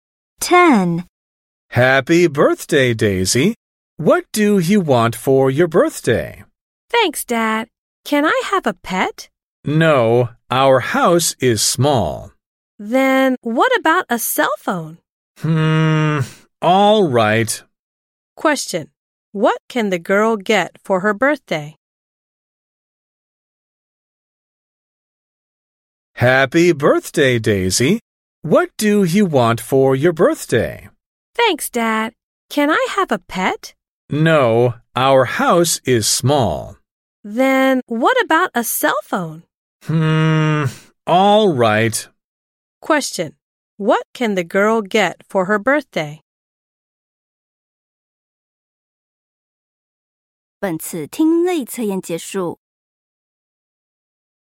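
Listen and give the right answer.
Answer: A cell phone.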